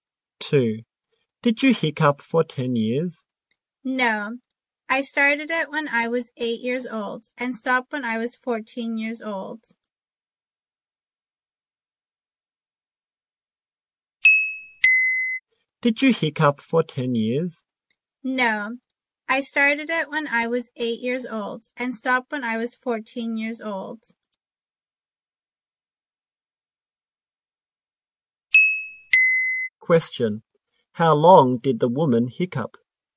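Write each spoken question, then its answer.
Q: How long did the woman hiccup?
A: Six years.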